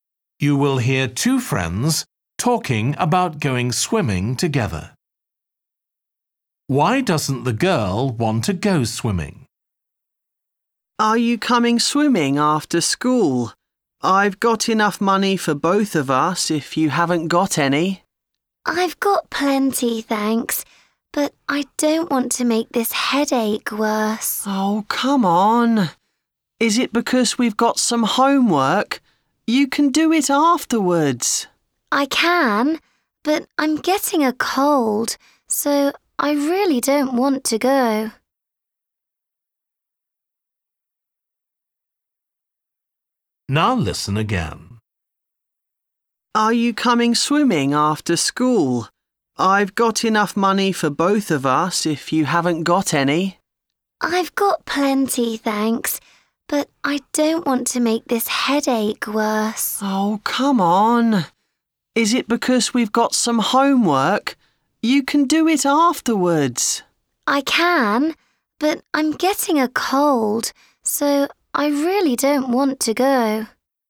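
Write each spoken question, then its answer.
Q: Why doesn't the girl want to go swimming?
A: She's getting a cold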